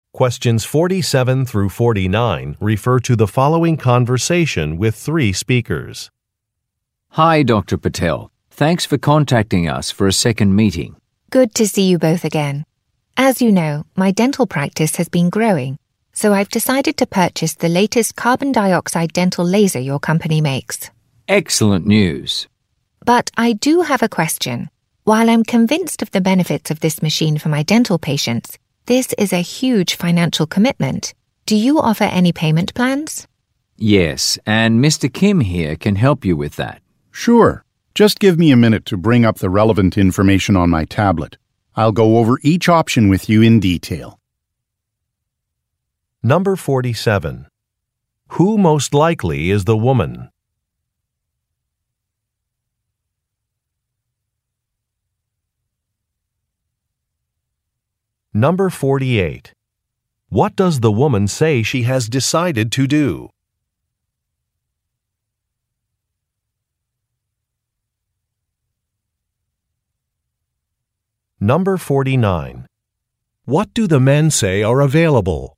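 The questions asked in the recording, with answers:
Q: Who most likely is the woman?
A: A dentist

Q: What does the woman say she has decided to do?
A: Purchase a new carbon dioxide dental laser

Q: What do the men say are available?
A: Payment plans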